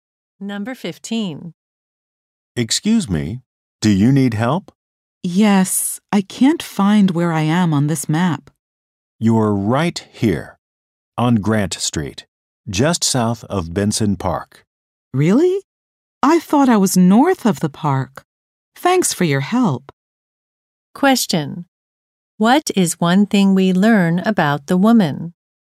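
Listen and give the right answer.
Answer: She was wrong about where she was on the map; she's south of Benson Park.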